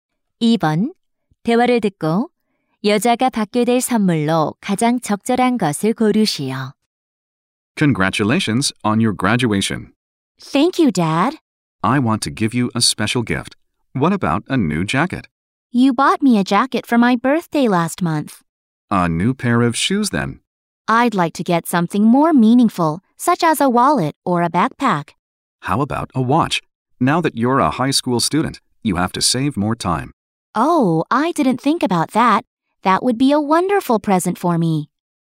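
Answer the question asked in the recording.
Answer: 손목시계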